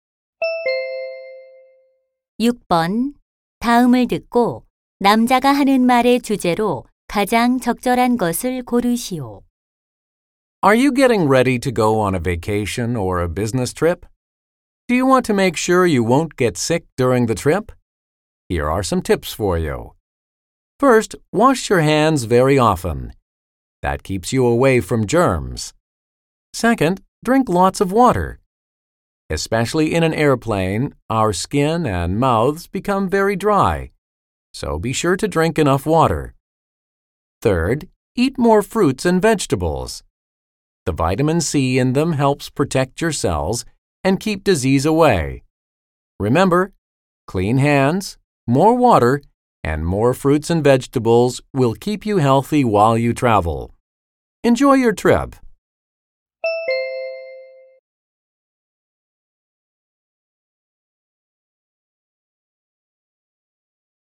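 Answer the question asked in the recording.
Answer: 여행 중 건강을 지키는 방법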